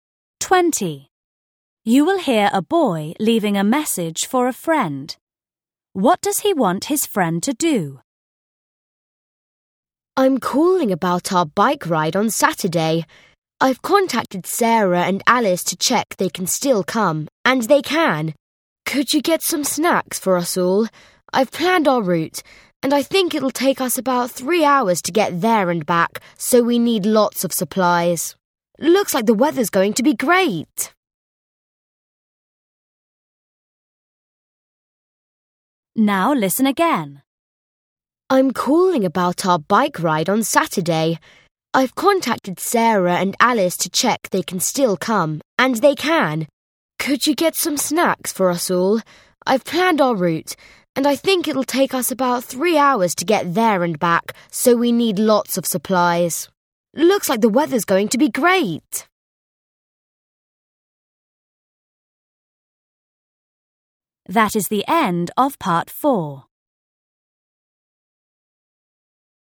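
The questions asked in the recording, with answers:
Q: What does he want his friend to do?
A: Get some snacks for everyone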